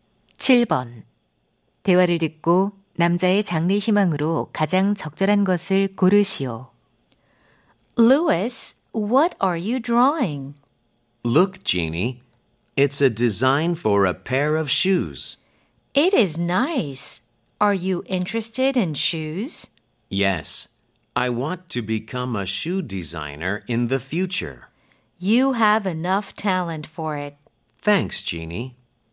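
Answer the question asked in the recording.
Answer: 신발 디자이너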